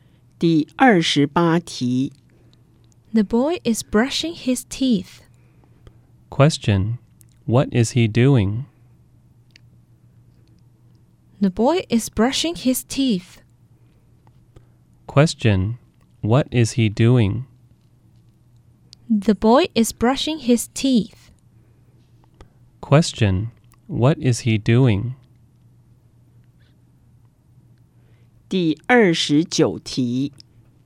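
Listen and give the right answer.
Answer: He is brushing his teeth.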